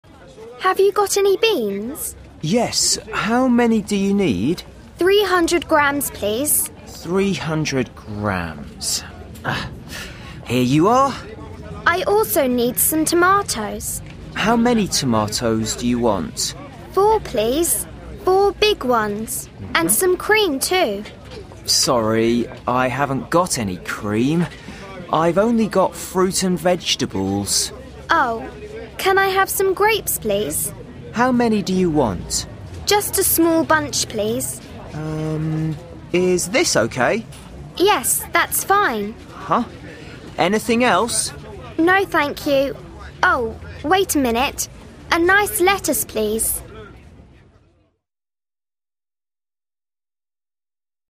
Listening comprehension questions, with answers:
3. Rebecca is doing the shopping. Listen and complete her shopping list.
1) _____ (big)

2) a 8) _____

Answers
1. four
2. lettuce